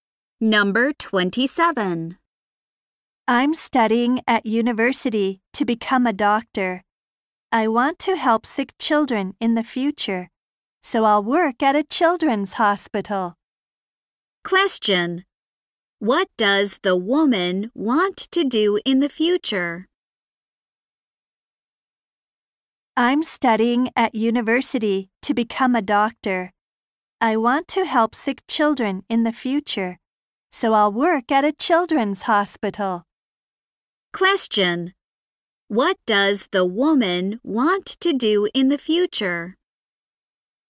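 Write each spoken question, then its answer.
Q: What does the woman want to do in the future?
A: Work as a doctor at a children's hospital and help sick children.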